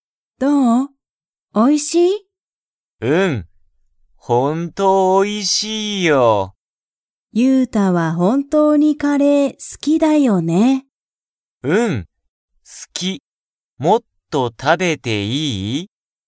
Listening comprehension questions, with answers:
ゆうたは、カレーをもっと食(た)べたいですか?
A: はい